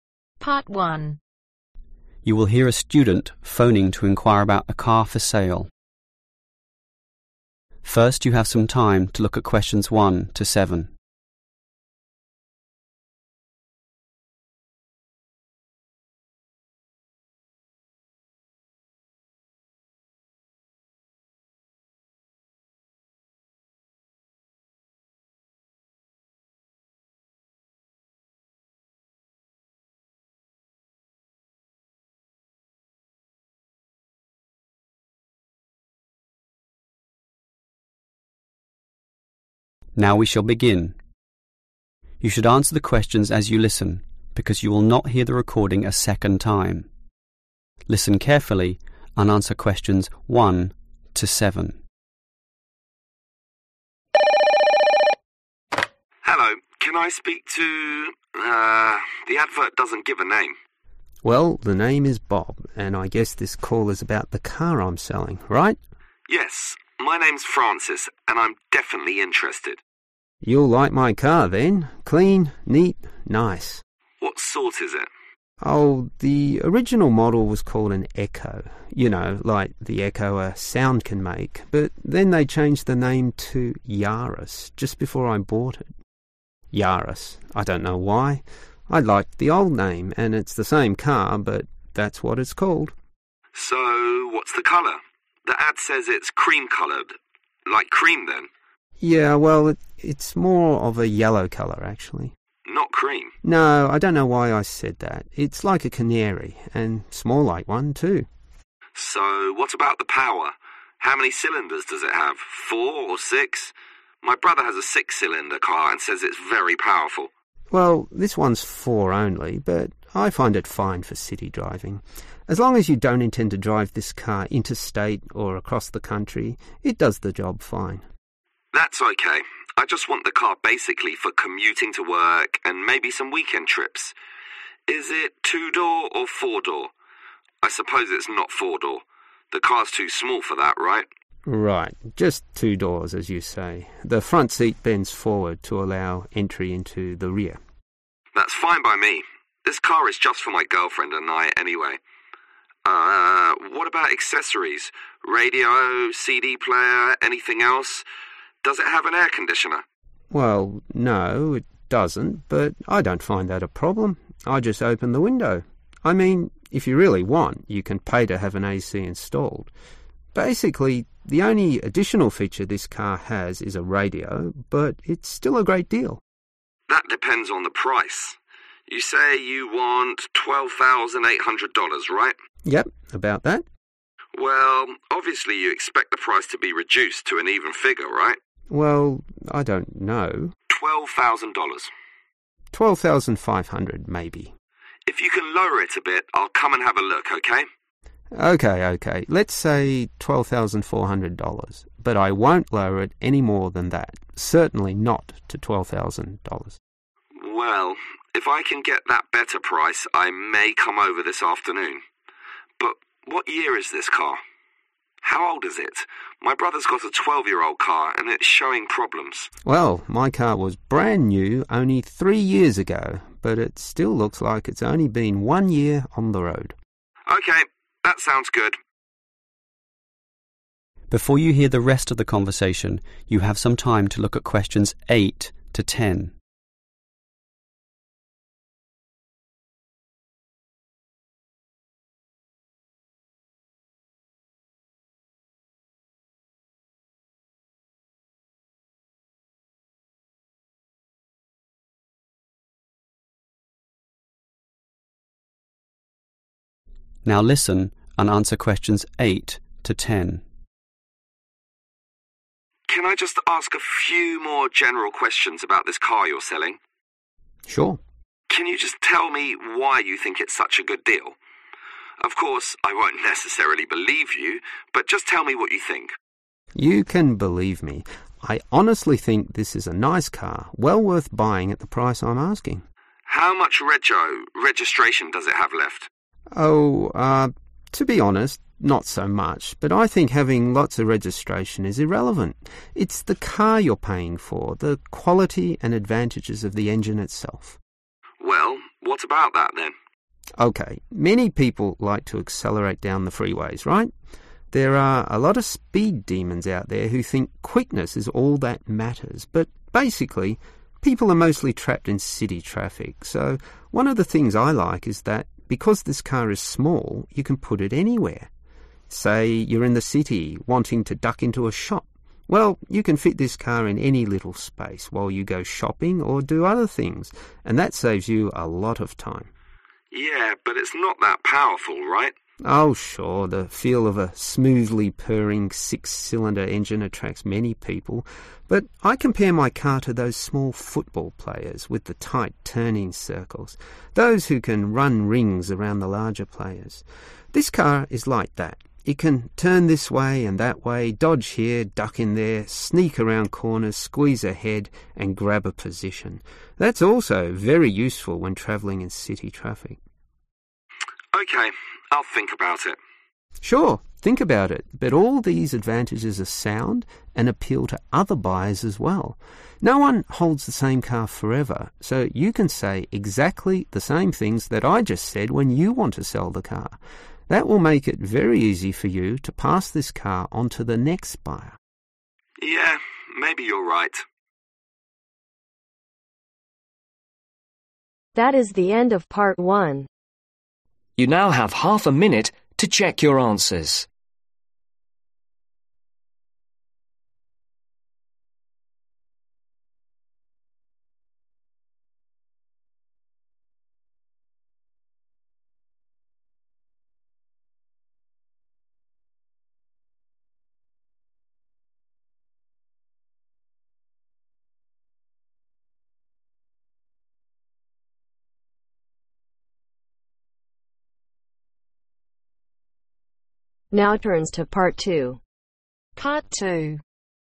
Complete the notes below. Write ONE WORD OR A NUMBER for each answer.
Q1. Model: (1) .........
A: Yaris

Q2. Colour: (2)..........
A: Yellow

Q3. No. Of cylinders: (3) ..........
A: 4

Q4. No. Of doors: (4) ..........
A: 2

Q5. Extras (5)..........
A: radio

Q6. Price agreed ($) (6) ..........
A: 12,400

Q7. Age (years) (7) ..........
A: 3